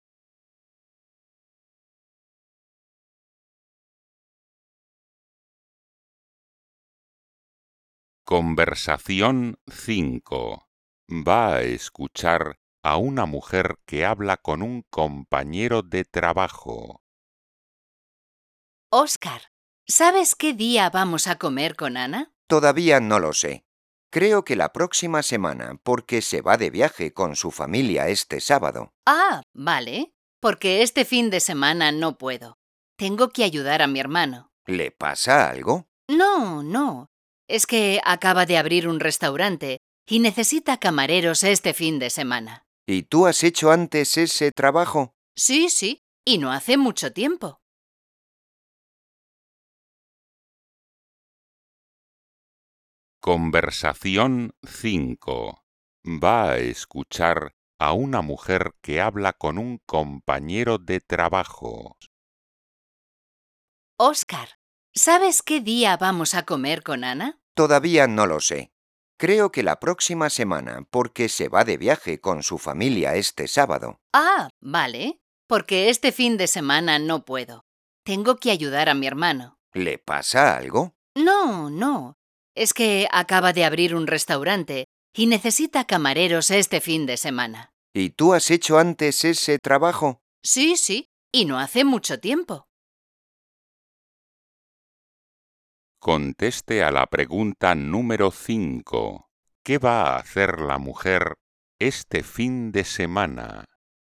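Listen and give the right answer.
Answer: Trabajar de camarera en el restaurante de su hermano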